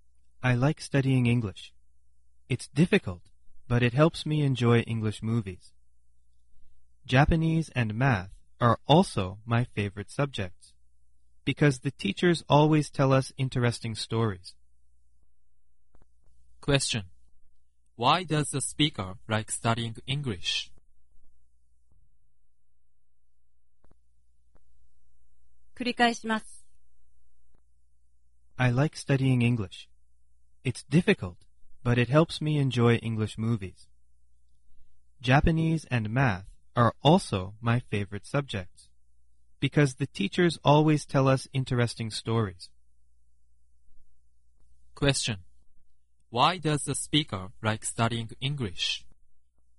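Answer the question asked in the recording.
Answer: Because it helps the speaker enjoy English movies.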